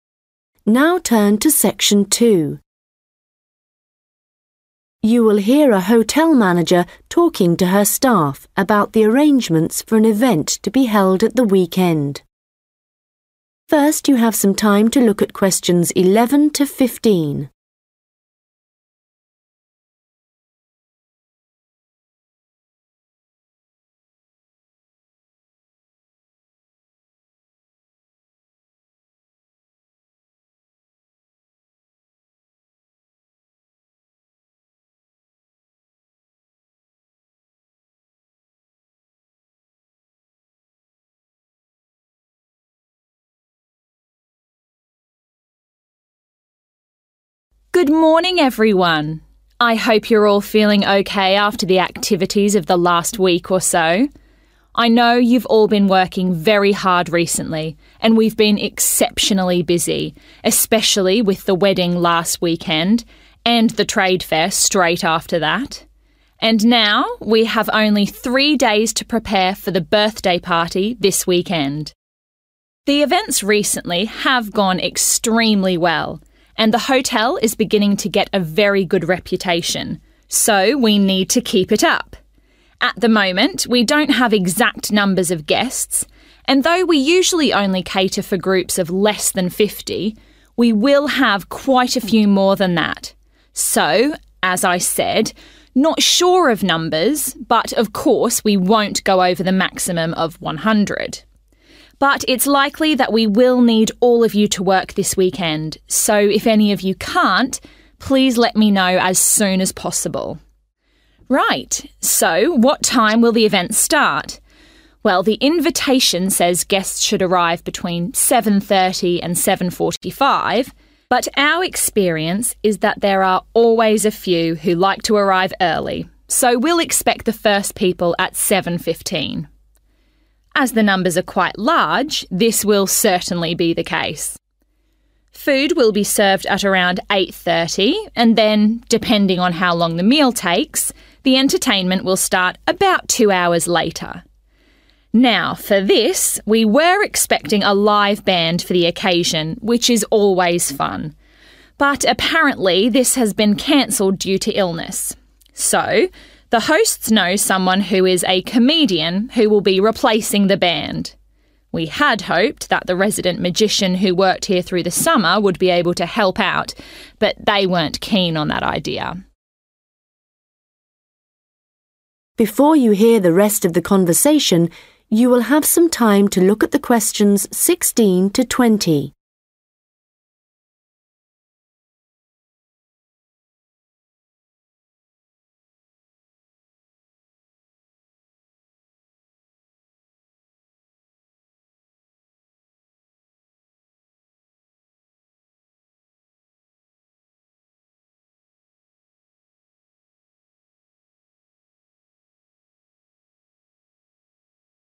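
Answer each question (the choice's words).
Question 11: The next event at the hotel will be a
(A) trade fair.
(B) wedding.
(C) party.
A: party.

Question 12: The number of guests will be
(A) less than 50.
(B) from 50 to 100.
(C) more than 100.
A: from 50 to 100.

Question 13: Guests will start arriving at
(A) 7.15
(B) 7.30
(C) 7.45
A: 7.15

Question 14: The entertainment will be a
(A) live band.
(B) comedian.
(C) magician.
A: comedian.

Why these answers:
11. And now we have only three days to prepare for the birthday party this weekend. (Và bây giờ chúng ta chỉ có 3 ngày để chuẩn bị cho bữa tiệc sinh nhật vào cuối tuần này.)
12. At the moment, we don't have exact numbers of guests and though we usually only cater for groups of less than fifty, we will have quite a few more than that. So – as I said – not sure of numbers but of course we won't go over the maximum of 100. (mặc dù chúng ta thường chỉ phục vụ cho nhóm dưới 50 người, nhưng chúng ta sẽ có nhiều khách hơn như vậy. 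Như tôi đã nói, dù không chắc chắn về con số cụ thể nhưng đương nhiên sẽ không vượt quá con số tối đa là 100.)
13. Well, the invitation says guests should arrive between 7.30 and 7.45 but our experience is that there are always a few who like to arrive early so we'll expect the first people at 7.15. (luôn luôn có một số người thích đến sớm, vậy nên chúng ta sẽ đón tiếp những vị khách đầu tiên vào lúc 7 giờ 15 phút.)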